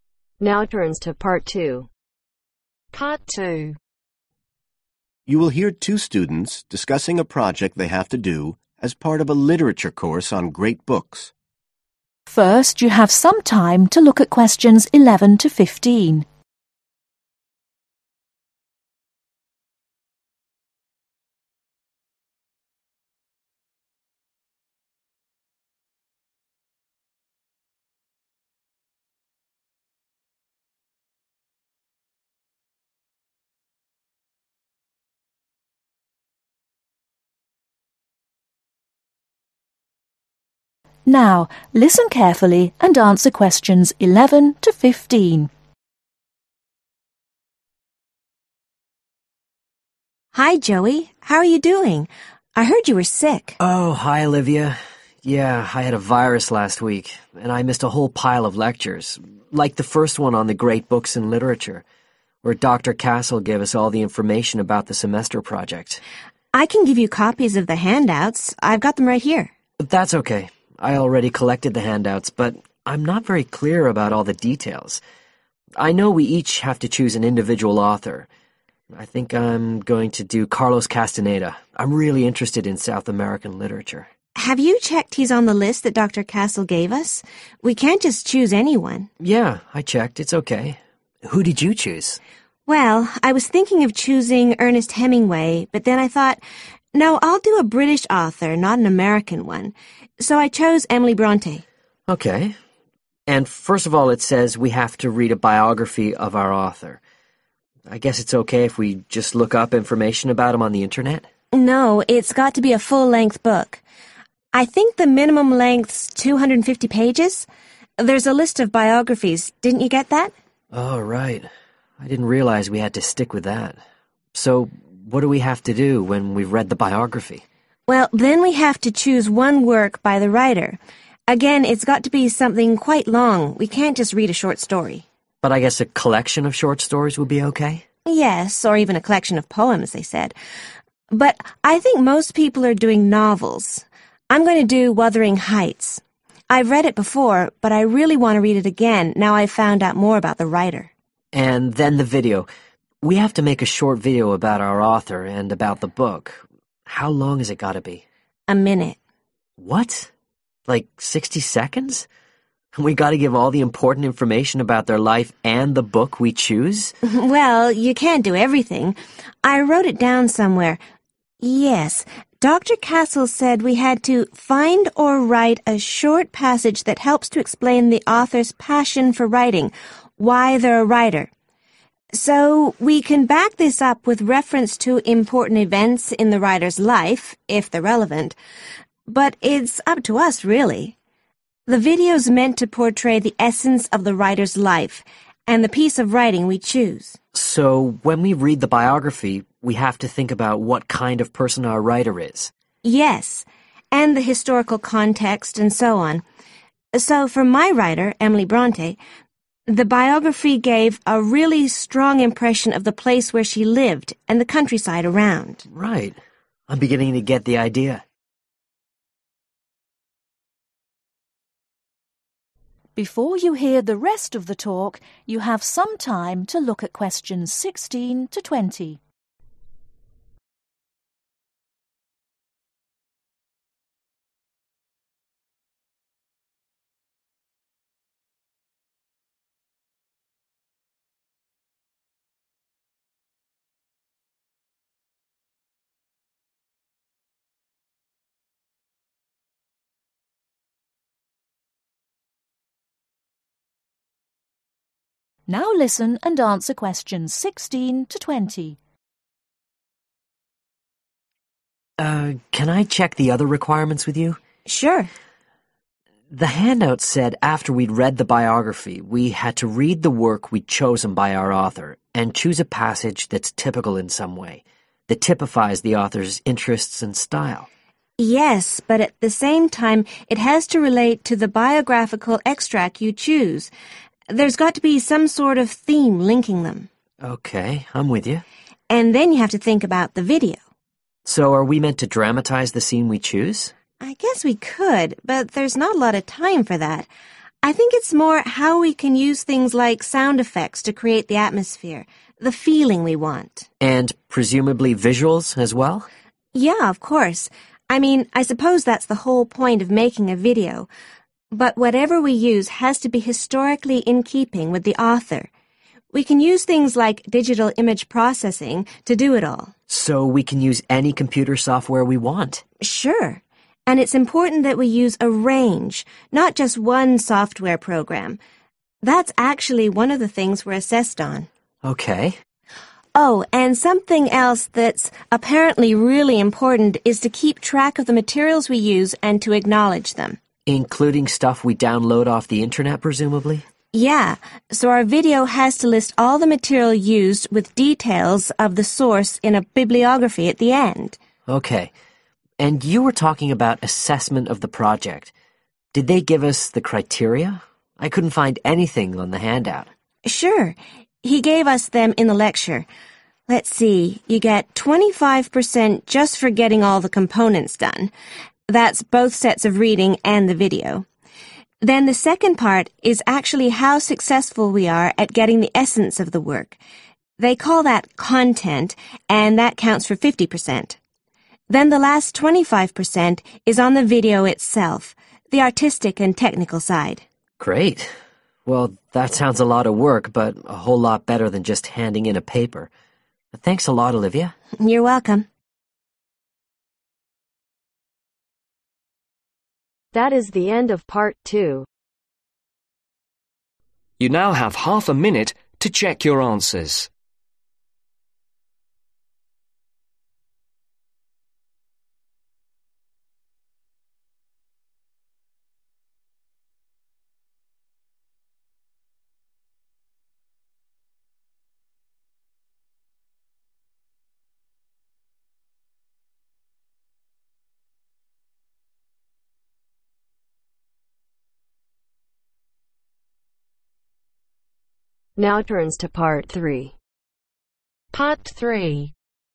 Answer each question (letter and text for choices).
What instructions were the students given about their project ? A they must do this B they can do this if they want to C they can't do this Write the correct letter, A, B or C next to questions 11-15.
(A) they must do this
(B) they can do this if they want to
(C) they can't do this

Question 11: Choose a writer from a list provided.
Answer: (A) they must do this

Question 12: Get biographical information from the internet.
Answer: (C) they can't do this

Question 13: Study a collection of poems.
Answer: (B) they can do this if they want to

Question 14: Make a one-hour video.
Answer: (C) they can't do this

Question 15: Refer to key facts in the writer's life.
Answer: (B) they can do this if they want to

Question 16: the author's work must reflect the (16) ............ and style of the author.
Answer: interests

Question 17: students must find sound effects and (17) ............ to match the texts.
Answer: visuals

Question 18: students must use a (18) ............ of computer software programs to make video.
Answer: range

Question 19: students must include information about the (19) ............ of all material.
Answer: source (s)

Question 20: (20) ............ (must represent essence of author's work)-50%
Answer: content